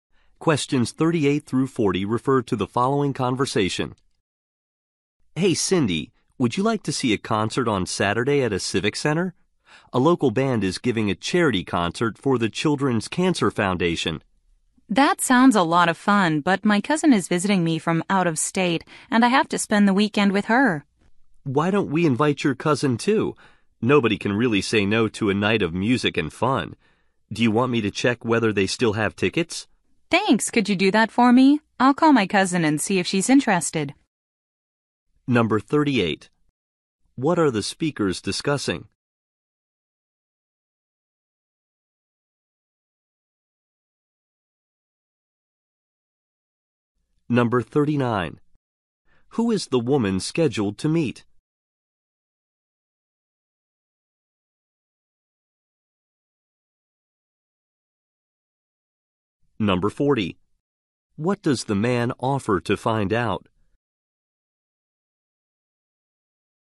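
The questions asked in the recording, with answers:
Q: What are the speakers discussing?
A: A charity concert

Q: Who is the woman scheduled to meet?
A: Her cousin

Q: What does the man offer to find out?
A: Whether tickets are still available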